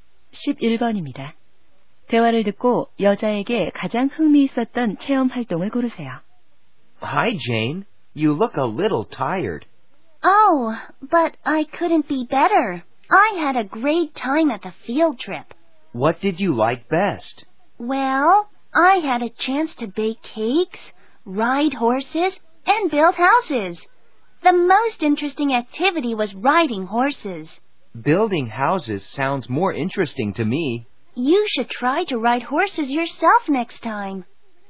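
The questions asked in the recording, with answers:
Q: 대화를 듣고 여자에게 가장 흥미있었던 체험 활동을 고르세요.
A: 말 타기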